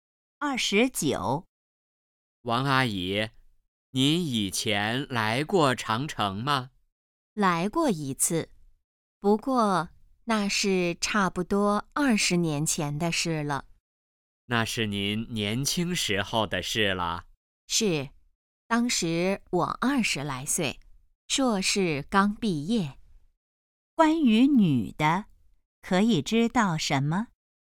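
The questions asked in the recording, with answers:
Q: 关于女的,可以知道什么?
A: 大约20年前来过长城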